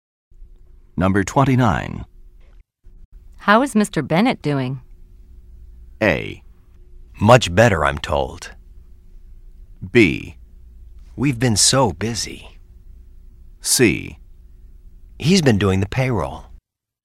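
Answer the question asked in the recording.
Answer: A: Much better, I'm told.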